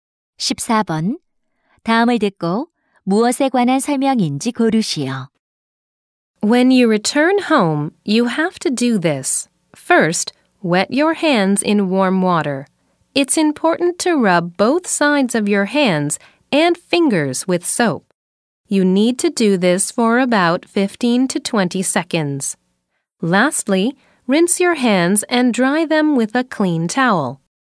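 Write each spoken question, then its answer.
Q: 다음을 듣고 무엇에 관한 설명인지 고르시오.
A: 손 씻기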